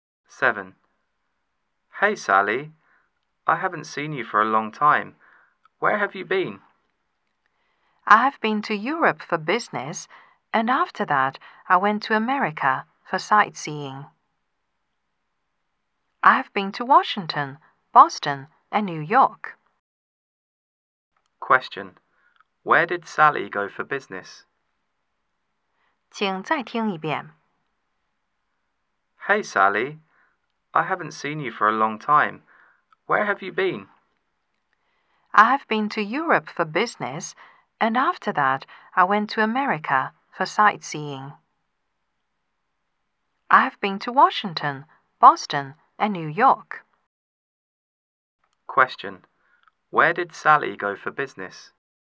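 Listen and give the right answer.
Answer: Europe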